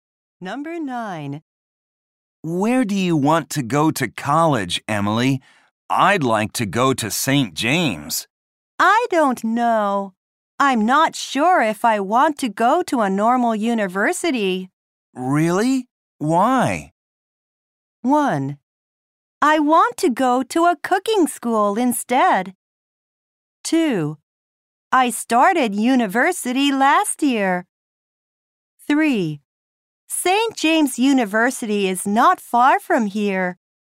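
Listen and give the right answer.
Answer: 1: I want to go to a cooking school instead.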